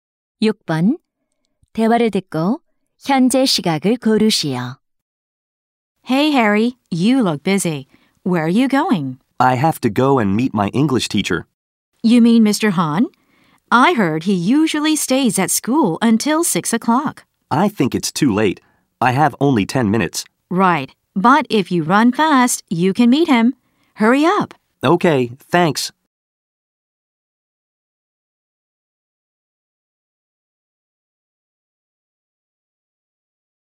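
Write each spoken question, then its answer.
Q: 대화를 듣고 현재 시각을 고르시오.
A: 5시 50분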